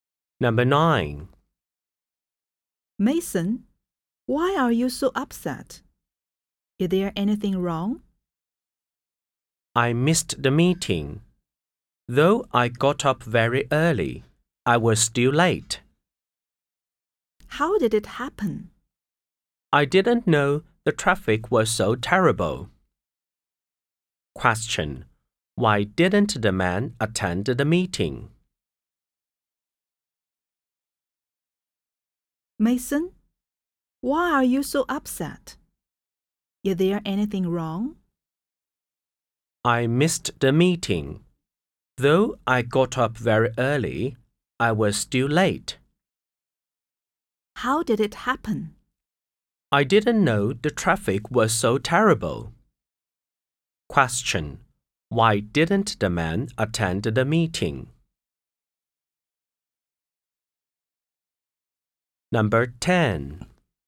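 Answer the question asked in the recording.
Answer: Because the traffic was terrible and he was late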